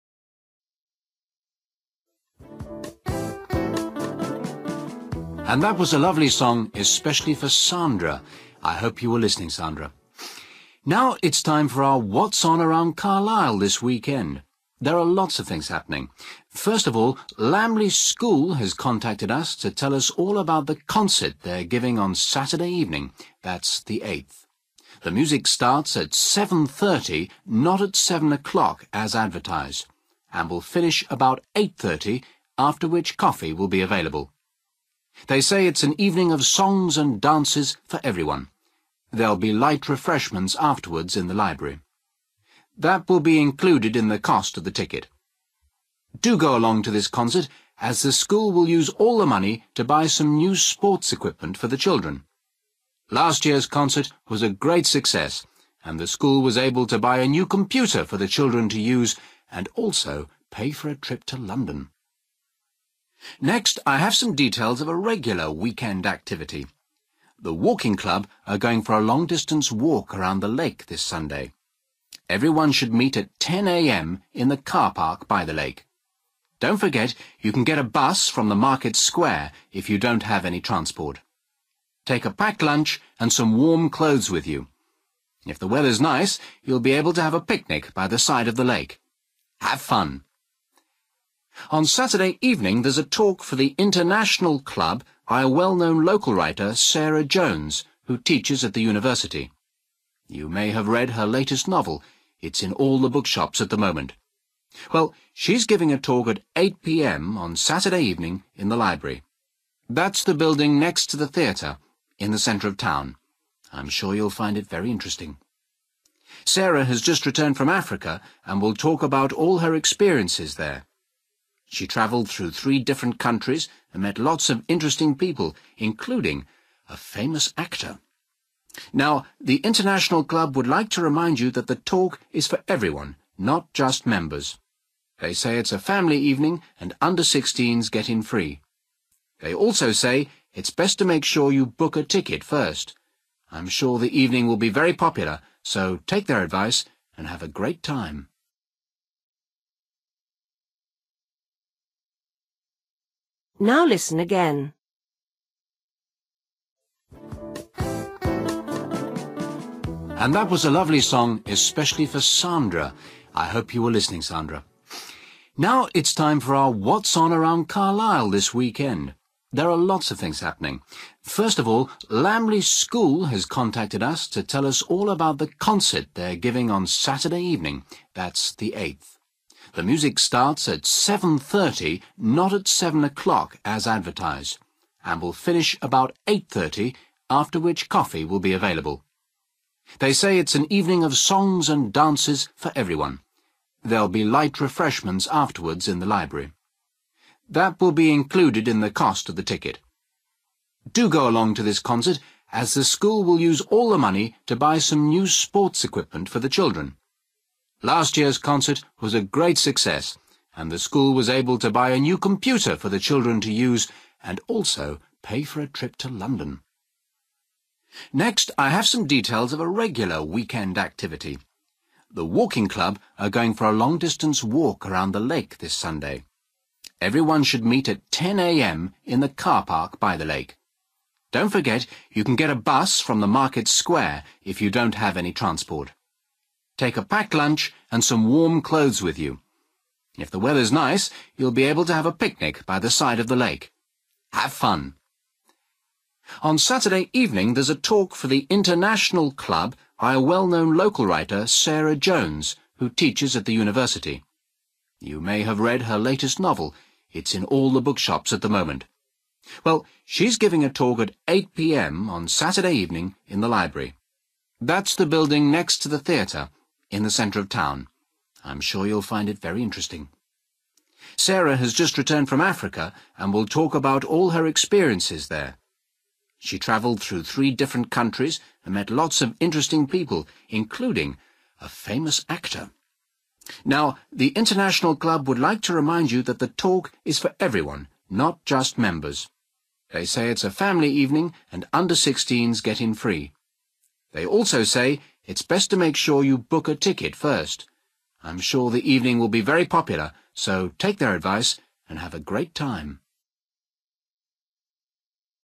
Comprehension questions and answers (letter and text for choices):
For each question, choose the correct answer.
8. The concert starts at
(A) 7 pm.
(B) 7.30 pm.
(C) 8.30 pm.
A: (B) 7.30 pm.

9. The money from the concert will pay for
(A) books for the school library.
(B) some school sports equipment.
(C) a school trip to London.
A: (B) some school sports equipment.

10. The Walking Club will meet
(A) in the market square.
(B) at the bus station.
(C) in the car park by the lake.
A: (C) in the car park by the lake.

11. You can hear a talk by a writer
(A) in the library.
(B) at the bookshop.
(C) at the university.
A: (A) in the library.

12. The writer will talk about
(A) a famous person she has written about.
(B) a recent journey she has made.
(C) the next book she will write.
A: (B) a recent journey she has made.

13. To go to the talk you should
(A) be a club member.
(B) be over 16.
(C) book a ticket.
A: (C) book a ticket.

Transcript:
Presenter: And that was a lovely song especially for Sandra. I hope you were listening Sandra. Now, it's time for our 'What's on around Carlisle', this weekend. There are lots of things happening. First of all, Lambly school has contacted us to tell us all about the concert they are giving on Saturday evening, that's the 8th. The music starts at 7.30 not at 7 o'clock as advertised, and will finish about 8.30 after which coffee will be available. They say it's an evening of songs and dances for everyone. There'll be light refreshments afterwards in the library. That will be included in the cost of the ticket. Do go along to this concert as the school will use all the money to buy some new sports equipment for the children. Last year's concert was a great success and the school was able to buy a new computer for the children to use and also pay for a trip to London.
Next, I have some details of a regular weekend activity. The Walking Club are going for a long distance walk around the lake this Sunday. Everyone should meet at 10 am in the car park by the lake. Don't forget you can get a bus from the market square if you don't have any transport. Take a packed lunch and some warm clothes with you. If the weather's nice you'll be able to have a picnic by the side of the lake. Have fun!
On Saturday evening, there's a talk for the International Club by a well-known local writer, Sarah Jones, who teaches at the university. You may have read her latest novel, it's in all the bookshops at the moment. Well, she's giving a talk at 8 pm on Saturday evening in the library. That's the building next to the theatre, in the centre of town. I'm sure you'll find it very interesting. Sarah has just returned from Africa and will talk about all her experiences there. She travelled through three different countries and met lots of interesting people, including a famous actor. Now, the International Club would like to remind you that the talk is for everyone, not just members. They say it's a family evening and under 16s get in free. They also say it's best to make sure you book a ticket first. I'm sure the evening will be very popular, so take their advice and have a great time.

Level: B1